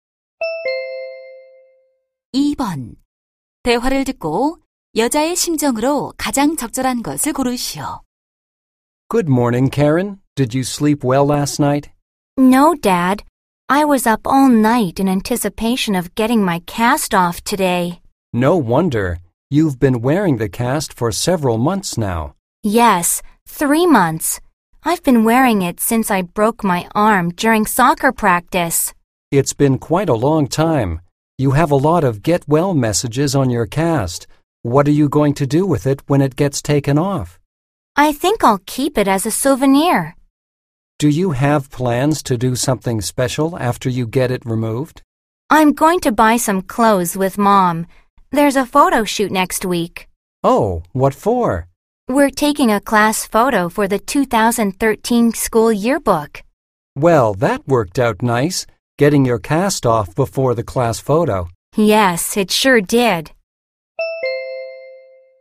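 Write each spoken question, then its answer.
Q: 대화를 듣고 여자의 심정으로 가장 적절한 것을 고르시오.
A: 기대되고 설렘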